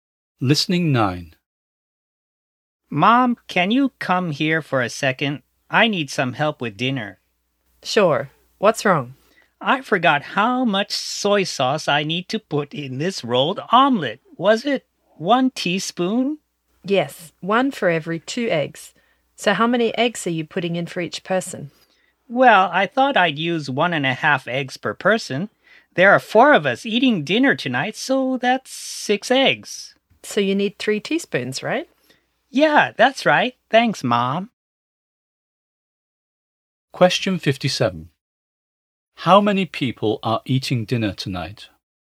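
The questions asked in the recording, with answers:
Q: How many people are eating dinner tonight?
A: Four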